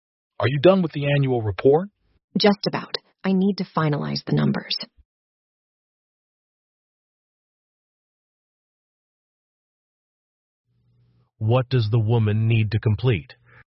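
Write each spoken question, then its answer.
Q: What does the woman need to complete?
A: The numbers for the annual report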